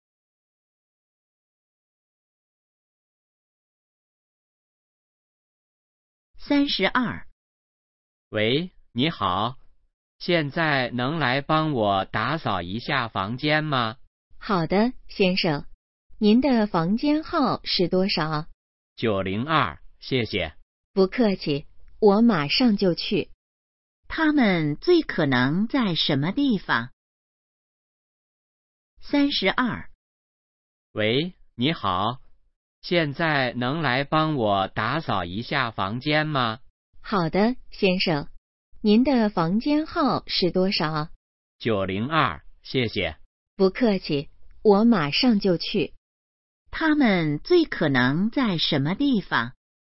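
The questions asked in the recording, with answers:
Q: 他们最可能在什么地方?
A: 宾馆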